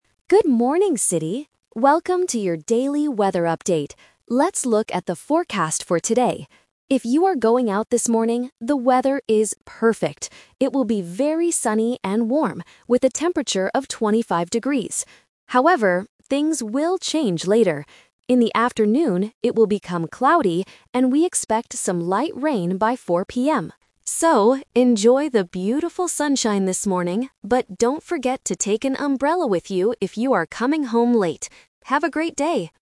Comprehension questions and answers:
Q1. What is the weather like this morning?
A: Sunny and warm.

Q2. What will happen in the afternoon?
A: It will become cloudy with light rain.

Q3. What does the announcer remind people to take with them?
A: An umbrella.

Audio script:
Announcer: Good morning, city! Welcome to your daily weather update. Let's look at the forecast for today. If you are going out this morning, the weather is perfect. It will be very sunny and warm, with a temperature of 25 degrees. However, things will change later. In the afternoon, it will become cloudy, and we expect some light rain by 4 PM. So, enjoy the beautiful sunshine this morning, but don't forget to take an umbrella with you if you are coming home late. Have a great day!